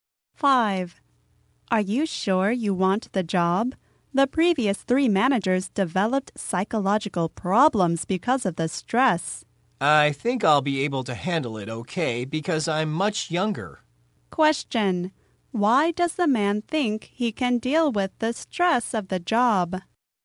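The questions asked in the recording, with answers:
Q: Why does the man think he can deal with the stress of the job?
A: He is much younger.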